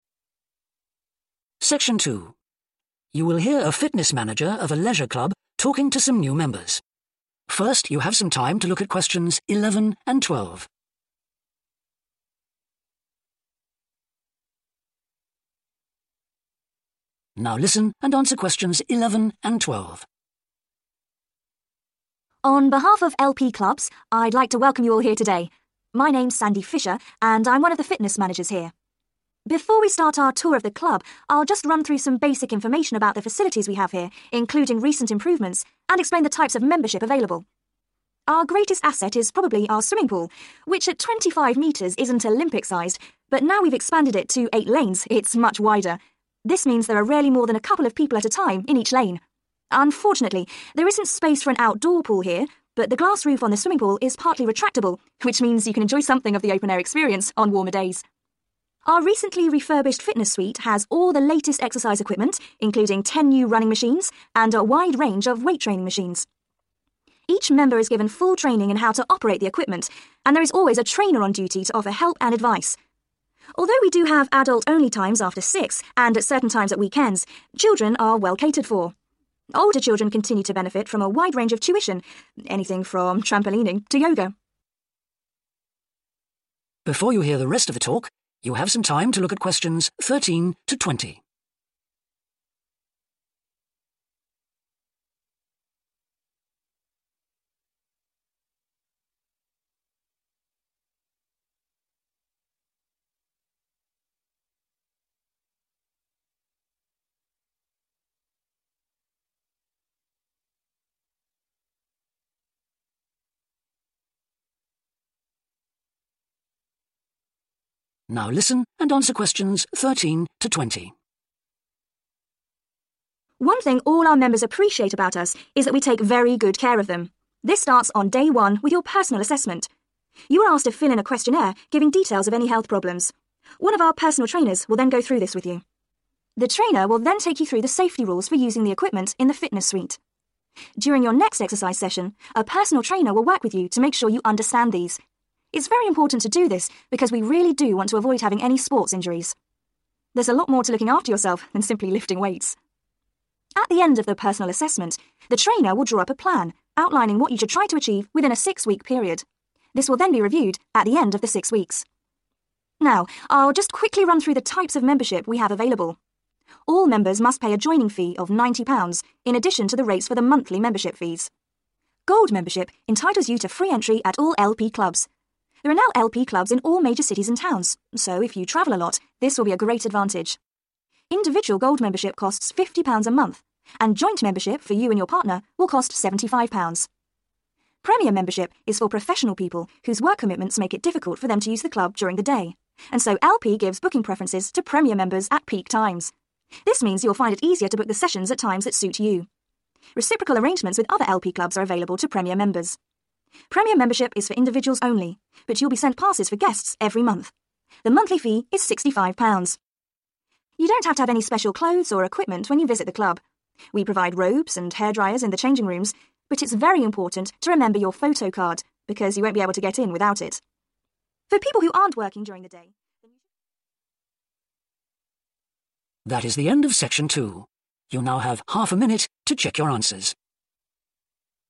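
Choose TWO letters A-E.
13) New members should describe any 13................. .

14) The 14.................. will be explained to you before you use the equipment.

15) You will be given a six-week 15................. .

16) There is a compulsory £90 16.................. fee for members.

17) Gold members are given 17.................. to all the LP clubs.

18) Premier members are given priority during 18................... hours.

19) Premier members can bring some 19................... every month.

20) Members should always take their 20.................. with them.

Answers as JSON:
{"13": "health problems", "14": "safety rules", "15": "plan", "16": "joining", "17": "free entry", "18": "peak", "19": "guests", "20": "photo card"}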